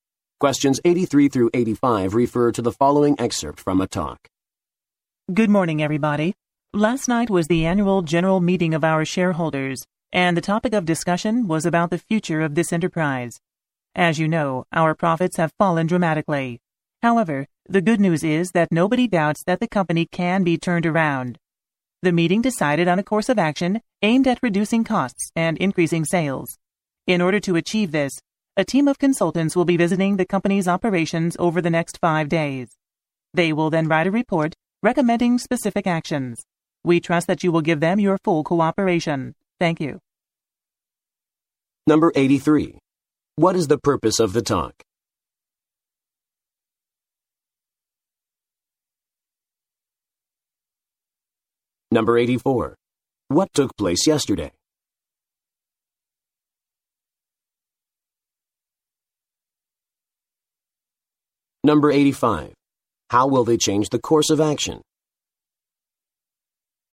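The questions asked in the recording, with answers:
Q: What took place yesterday?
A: The annual general meeting of shareholders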